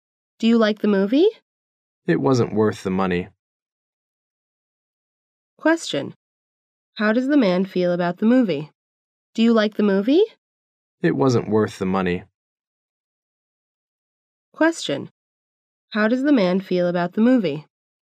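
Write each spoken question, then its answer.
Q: How does the man feel about the movie?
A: He didn't like it; it wasn't worth the money.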